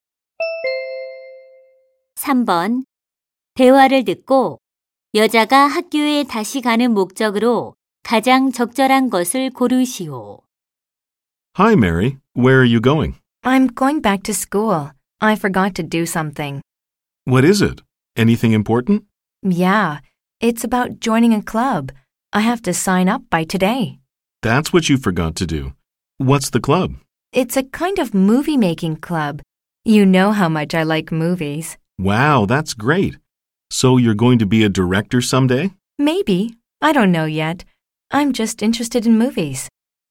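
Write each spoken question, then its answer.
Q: 대화를 듣고 여자가 학교에 다시 가는 목적으로 가장 적절한 것을 고르시오.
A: 영화 제작 동아리에 가입 신청하기 위해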